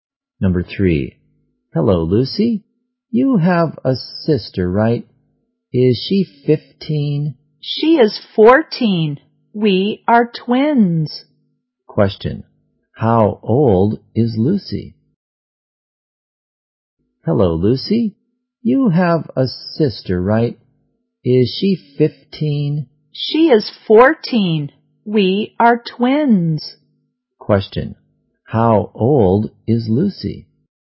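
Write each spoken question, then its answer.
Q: Question, how old is Lucy?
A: 14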